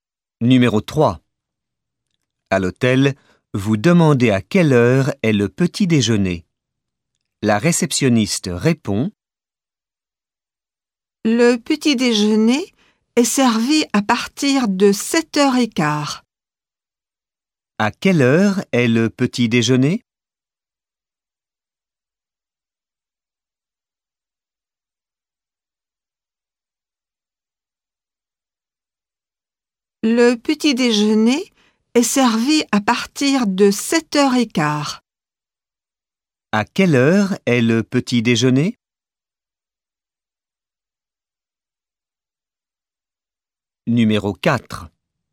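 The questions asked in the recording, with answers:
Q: À quelle heure est le petit déjeuner ?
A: À partir de 7h15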